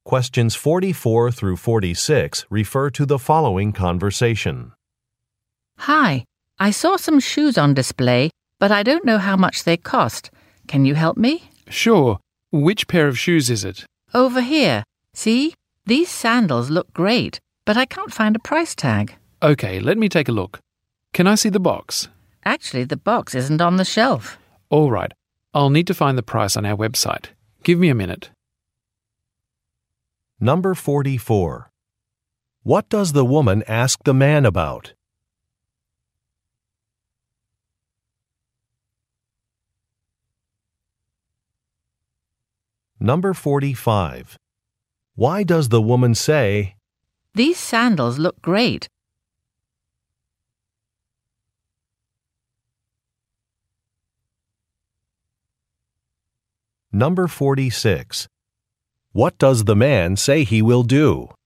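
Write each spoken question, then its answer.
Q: What does the woman ask the man about?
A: The price of a pair of shoes (sandals)

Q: What does the man say he will do?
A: Find the price on the store's website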